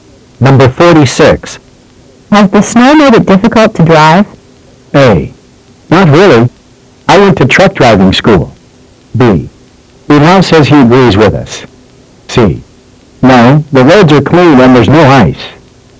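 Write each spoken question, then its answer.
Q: Has the snow made it difficult to drive?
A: C: No, the roads are clean and there's no ice.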